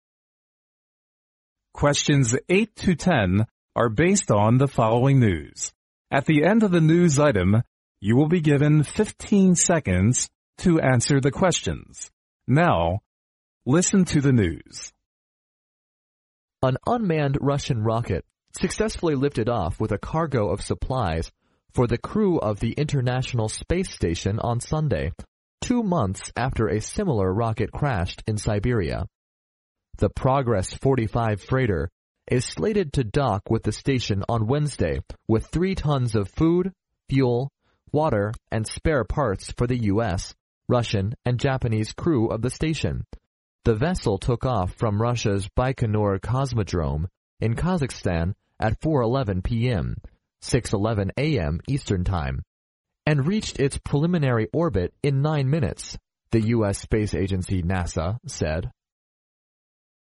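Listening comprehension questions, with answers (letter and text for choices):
Now listen to the news.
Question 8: What is the name of the unmanned Russian rocket?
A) The International Space Station.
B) The Siberia Vessel.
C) The Baikonur Cosmodrome.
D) The Progress 45.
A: D) The Progress 45.

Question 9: When is the freighter supposed to reach the International Space Station?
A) On Sunday.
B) On Monday.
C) On Tuesday.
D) On Wednesday.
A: D) On Wednesday.

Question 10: When did the vessel reach its preliminary orbit?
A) At 4:02 p.m.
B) At 4:11 p. m.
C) At 4:20 p.m.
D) At 6:11 p. m.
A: C) At 4:20 p.m.

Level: 英语四级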